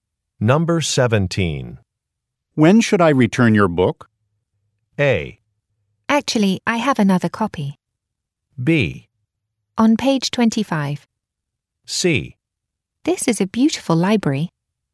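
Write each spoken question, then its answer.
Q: When should I return your book?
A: A: Actually, I have another copy.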